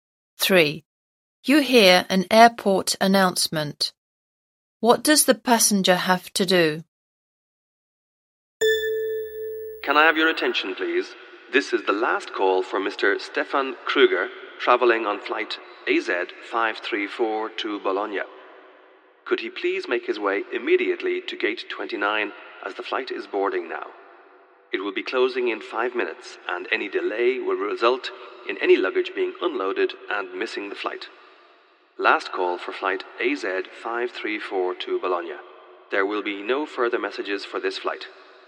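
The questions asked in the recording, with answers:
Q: What does the passenger have to do?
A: Go immediately to gate 29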